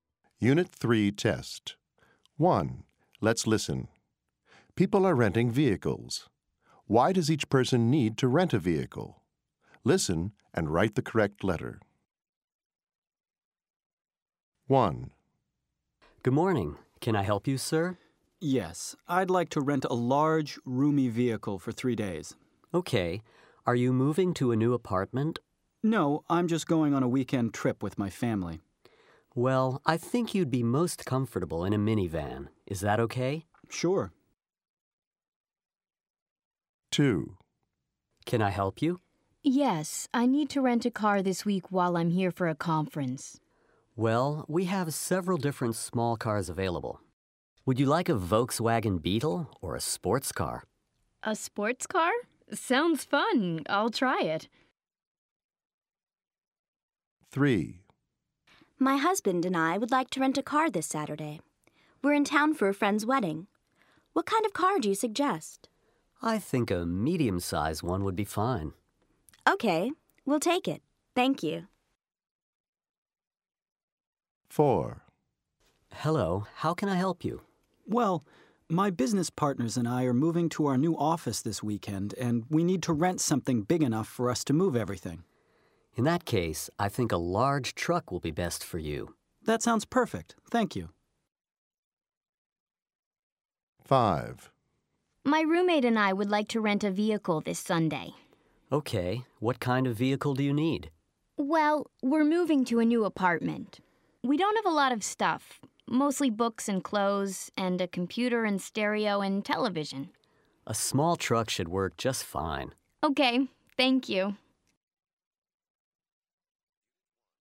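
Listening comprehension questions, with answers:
1. People are renting vehicles. Why does each person need to rent a vehicle? Listen and write the correct letter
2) The woman is___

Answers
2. here for a conference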